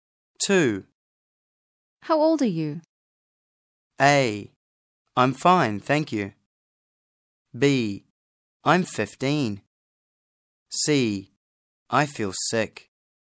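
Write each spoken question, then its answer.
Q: How old are you?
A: B: I'm 15.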